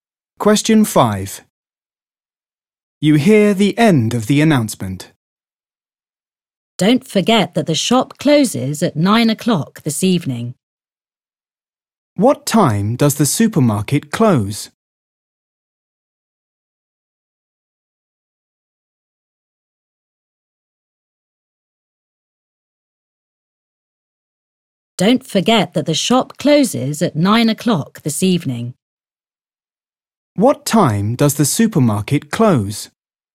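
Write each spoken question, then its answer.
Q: What time does the supermarket close?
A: 9 o'clock this evening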